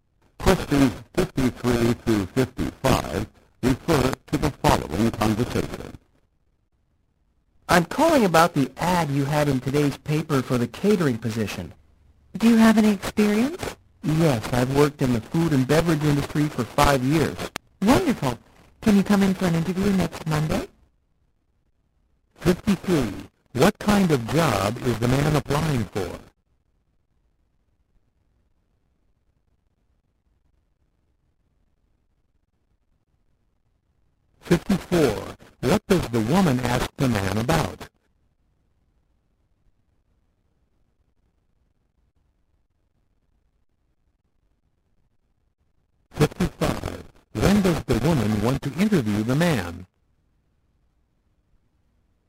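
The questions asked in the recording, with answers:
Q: What kind of job is the man applying for?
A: A catering job

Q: What does the woman ask the man about?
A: His experience

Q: When does the woman want to interview the man?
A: Next Monday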